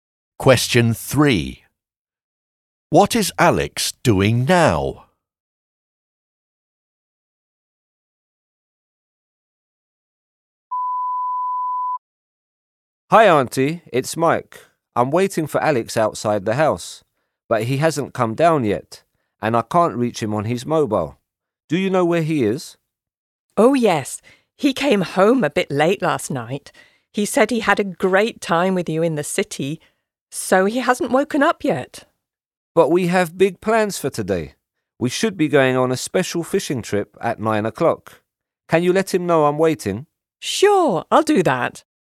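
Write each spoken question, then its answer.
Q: What is Alex doing now?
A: Sleeping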